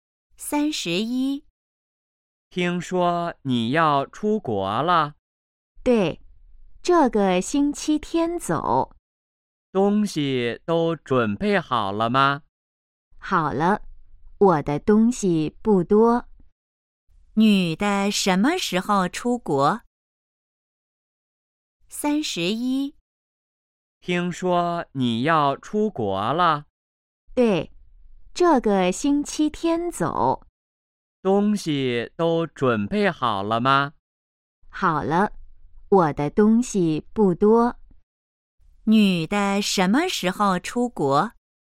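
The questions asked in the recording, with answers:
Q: 女的什么时候出国?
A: 这个星期天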